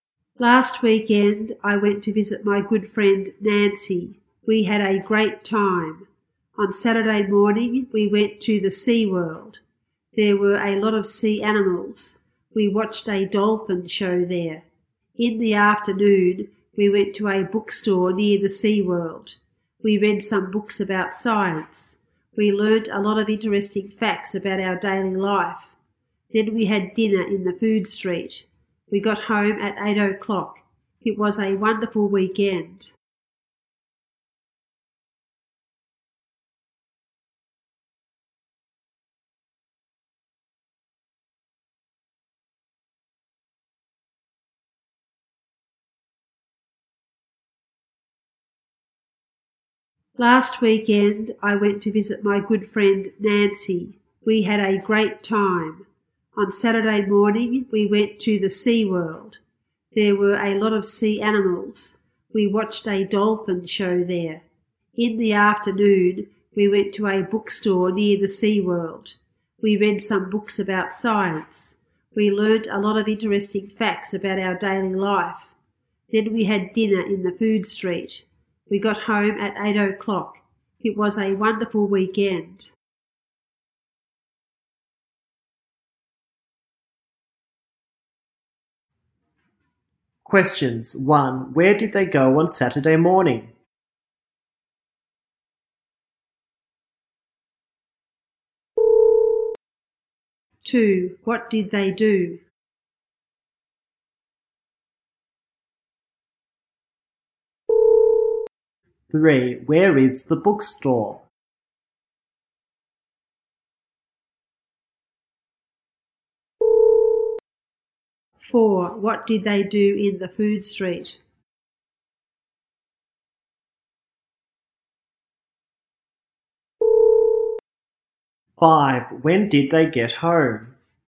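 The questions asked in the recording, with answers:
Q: 1. Where did they go on Saturday morning?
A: The Sea World

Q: 3. Where is the bookstore?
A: Near the Sea World

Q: 4. What did they do in the food street?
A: They had dinner.

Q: 5. When did they get home?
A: At 8 o'clock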